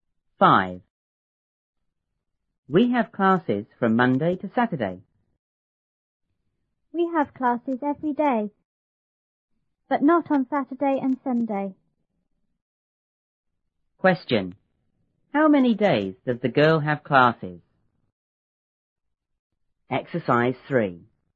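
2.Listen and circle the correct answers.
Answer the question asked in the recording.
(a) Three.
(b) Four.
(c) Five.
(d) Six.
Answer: (c) Five.

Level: 初中英语广州版1B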